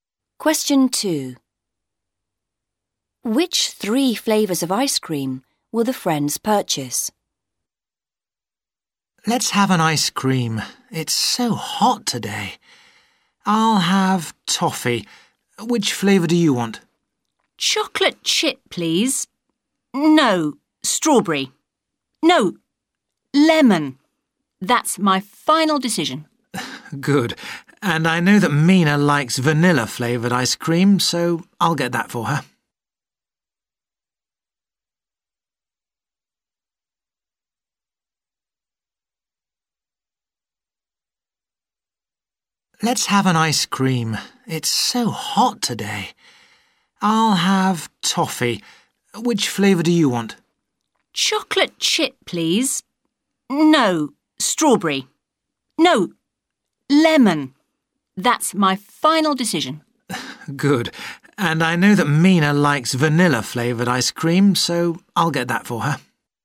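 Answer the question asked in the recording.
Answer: Toffee, lemon and vanilla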